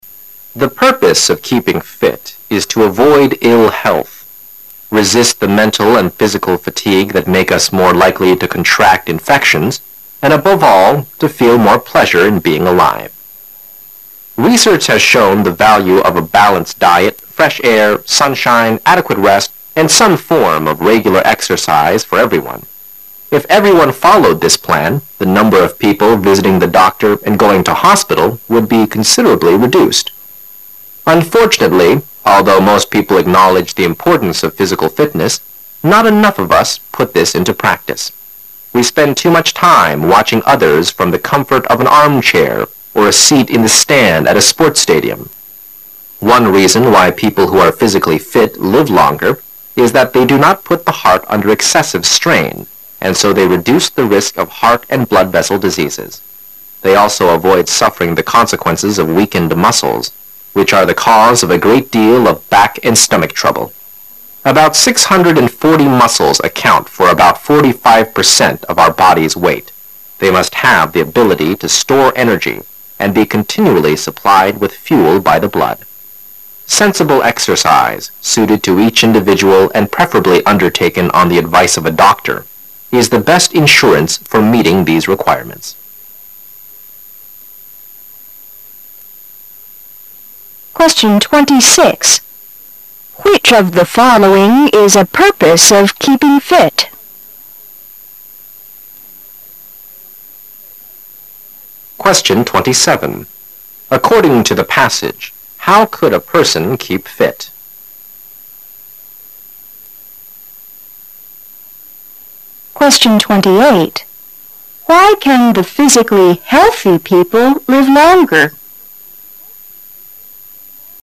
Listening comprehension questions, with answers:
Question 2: According to the passage, how could a person keep fit?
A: Have a balanced diet, fresh air, sunshine, enough rest and regular exercise.

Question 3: Why can the physically healthy people live longer?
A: Because their heart and blood vessel are strong enough.

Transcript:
[解析] 26-28 The purpose of keeping fit is to avoid iii health, resist the mental and physical fatigue that make us more likely to contract infections, and above all to feel more pleasure in being alive. Research has shown the value of a balanced diet, fresh air, sunshine, adequate rest and some forms of regular exercise for everyone. If everyone followed this plan, the number of people visiting the doctor and going to hospital would be considerably reduced. Unfortunately, although most people acknowledge the importance of physical fitness, not enough of us put this into practice; we spend too much time watching others from the comfort of an armchair or a seat in the stand at a sports stadium. One reason why people who are physically fit live longer is that they do not put the heart under excessive strain and so they reduce the risk of heart and blood vessel diseases. They also avoid suffering the consequences of weakened muscles, which are. the cause of a great deal of back and stomach trouble. About 640 muscles account for about 45% of our body's weight; they must have the ability to store, energy and be continually supplied with fuel by the blood. Sensible exercise, suited to each individual and preferably undertaken on the advice of a doctor, is the best insurance for meeting these requirements. 26. Which of the following is a purpose of keeping fit?